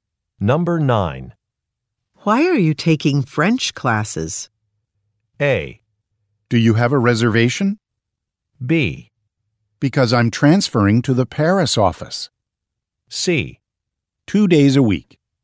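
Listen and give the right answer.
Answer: B: Because I'm transferring to the Paris office.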